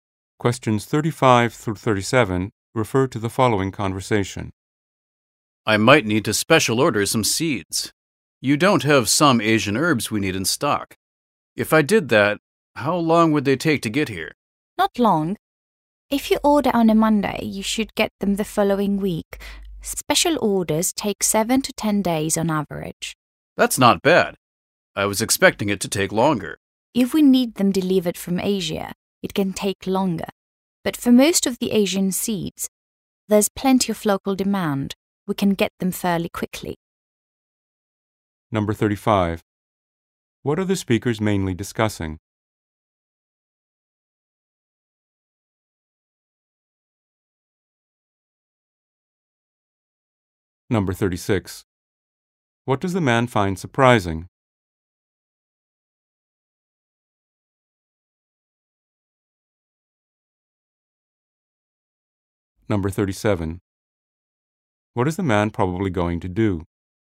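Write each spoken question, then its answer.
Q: What are the speakers mainly discussing?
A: Special ordering seeds

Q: What does the man find surprising?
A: Special orders arrive quickly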